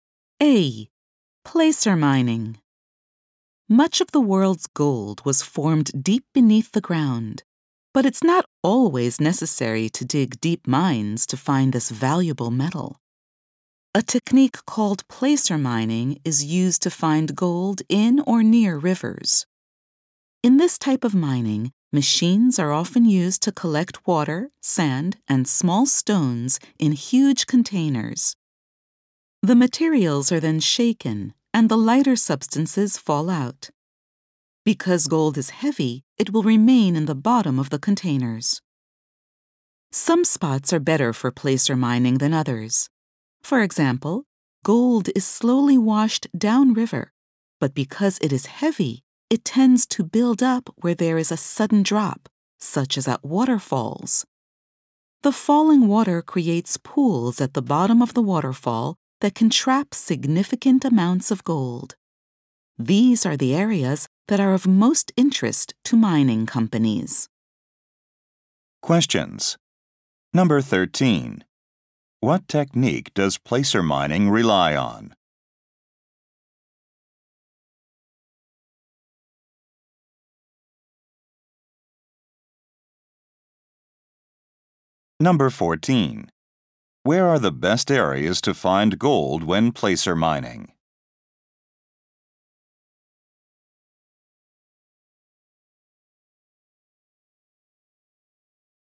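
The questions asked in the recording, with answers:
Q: What technique does placer mining rely on?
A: Shaking materials so lighter substances fall out and heavy gold remains

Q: Where are the best areas to find gold when placer mining?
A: In pools at the bottom of waterfalls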